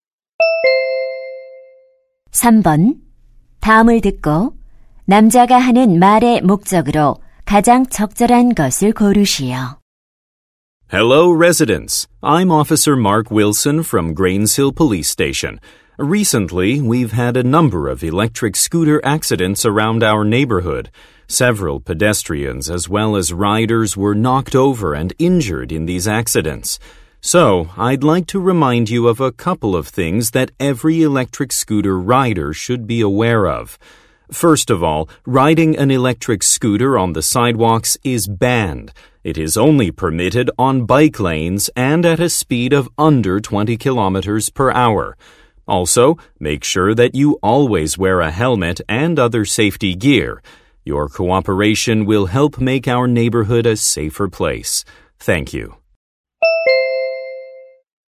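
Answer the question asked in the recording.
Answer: 전동 킥보드 이용 시 안전 수칙을 알리려고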